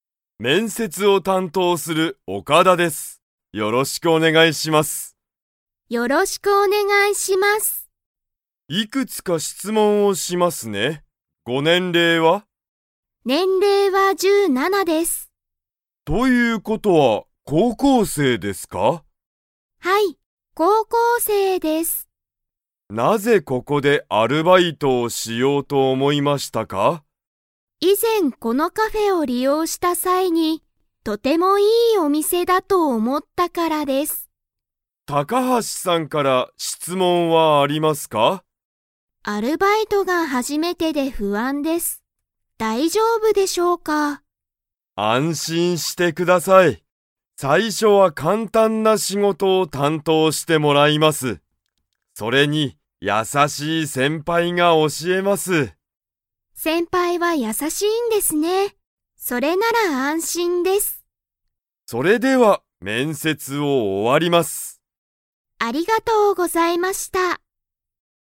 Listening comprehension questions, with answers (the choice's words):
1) 高橋たかはしさんの年齢ねんれいは 。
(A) 16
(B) 17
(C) 26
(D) 27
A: 17

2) 高橋たかはしさんは、アルバイトをしたことが 。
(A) ある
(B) ない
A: ない

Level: Level 4